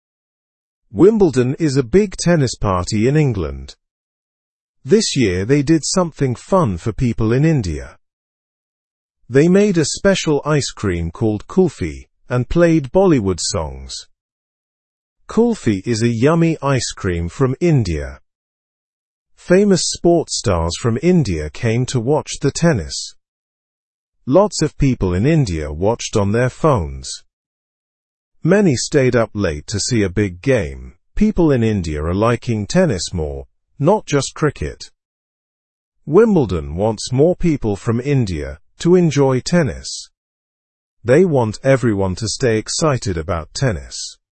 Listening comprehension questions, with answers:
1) What is Wimbledon?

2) What ice cream did Wimbledon add this year?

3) What kind of music was played at Wimbledon?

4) Who came to see the matches at Wimbledon?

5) How did people in India watch the matches?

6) What sport is India becoming interested in?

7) What does Wimbledon hope for the future?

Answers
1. Wimbledon is a famous tennis event in England.
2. They added kulfi, a special Indian ice cream.
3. Bollywood music was played at Wimbledon.
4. Famous cricketers and Indian people came.
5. They watched the matches online.
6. India is becoming interested in tennis.
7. They hope more Indians will like tennis.

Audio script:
Wimbledon is a big tennis party in England. This year, they did something fun for people in India. They made a special ice cream called kulfi and played Bollywood songs. Kulfi is a yummy ice cream from India. Famous sports stars from India came to watch the tennis. Lots of people in India watched on their phones. Many stayed up late to see a big game. People in India are liking tennis more, not just cricket. Wimbledon wants more people from India to enjoy tennis. They want everyone to stay excited about tennis.

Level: (Level 1)